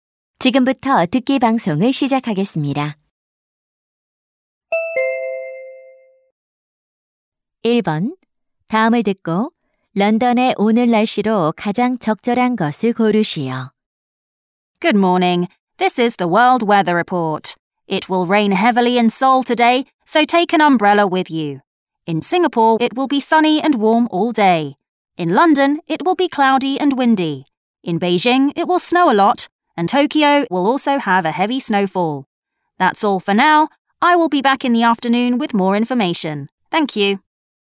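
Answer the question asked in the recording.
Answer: 흐리고 바람이 붊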